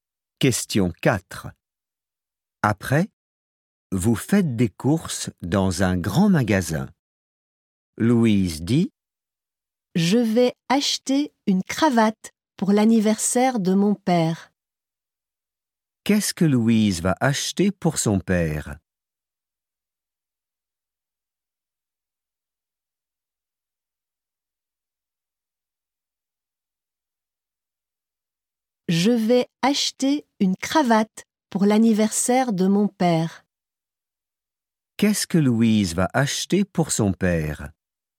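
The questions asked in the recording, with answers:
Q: Qu'est-ce que Louise va acheter pour son père?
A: Une cravate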